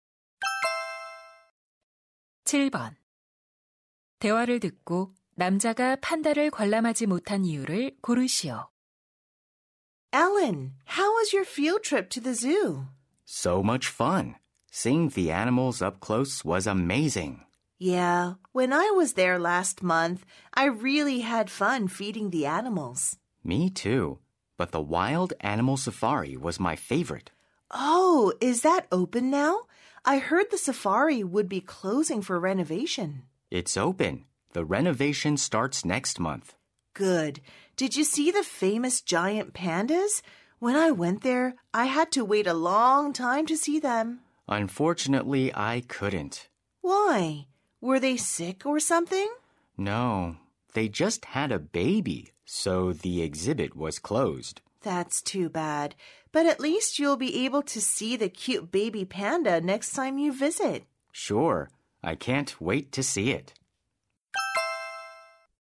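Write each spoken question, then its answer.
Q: 대화를 듣고 남자가 판다를 관람하지 못한 이유를 고르시오.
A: 판다가 새끼를 낳아 전시관이 닫혀서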